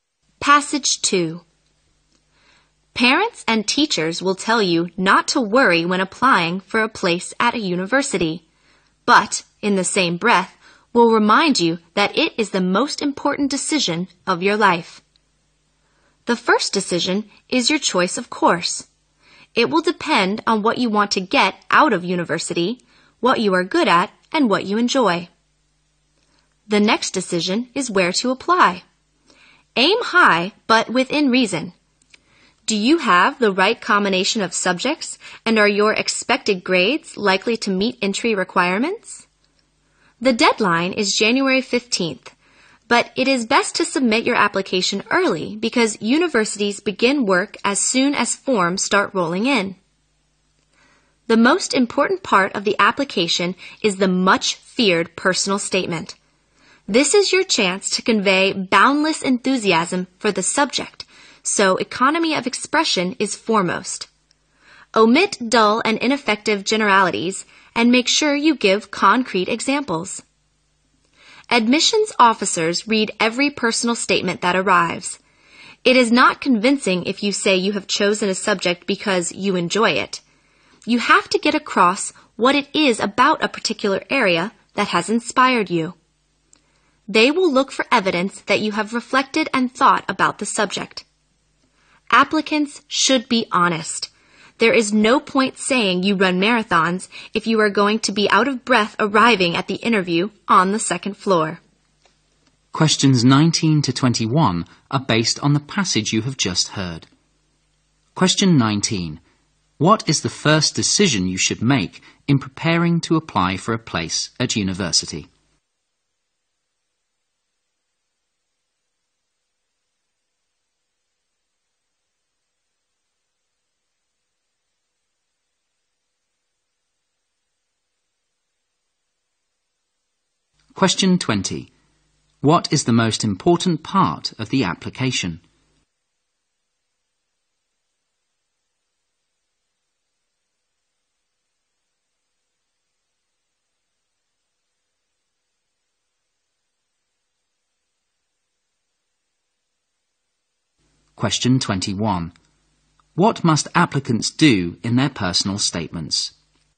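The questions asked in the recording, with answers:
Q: What is the first decision you should make in preparing to apply for a place at university?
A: Your choice of course.

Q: What is the most important part of the application?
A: The personal statement.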